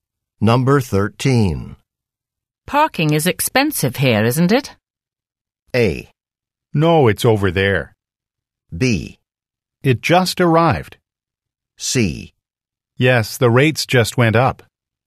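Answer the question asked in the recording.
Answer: C: Yes, the rates just went up.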